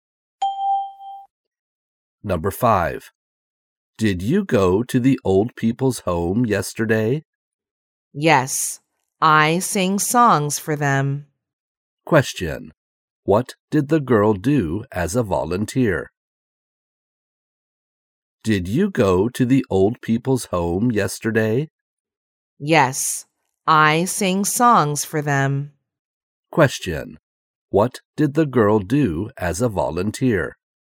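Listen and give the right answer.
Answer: She sang songs for the old people.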